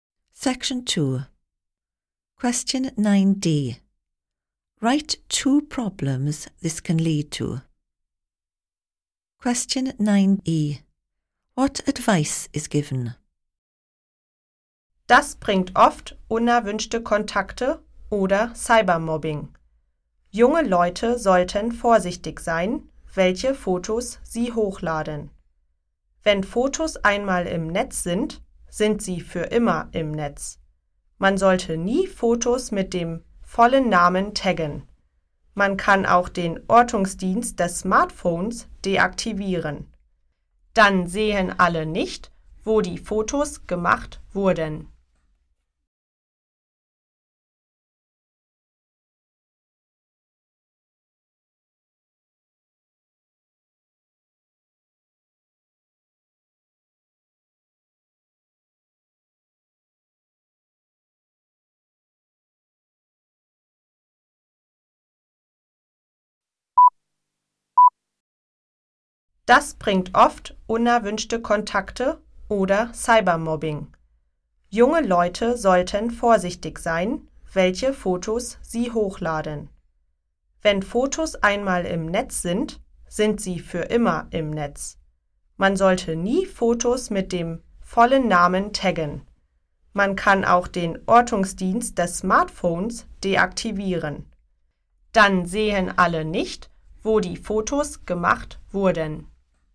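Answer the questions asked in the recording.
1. Unwanted contacts and cyberbullying
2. Be careful which photos you upload; never tag photos with full name; deactivate location services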